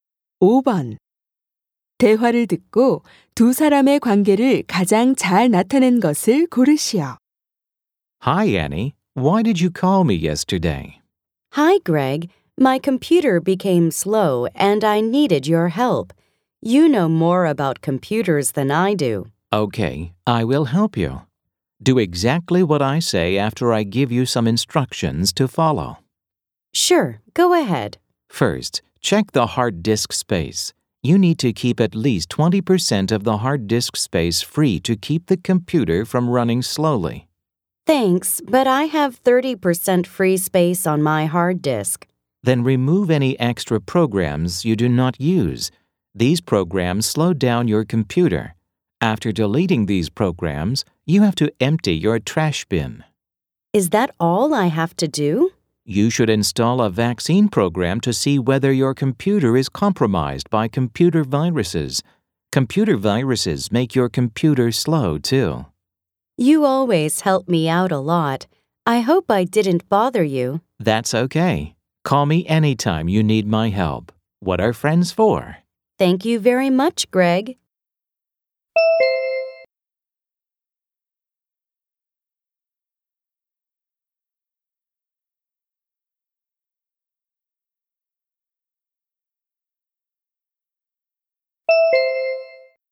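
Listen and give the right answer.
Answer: 친구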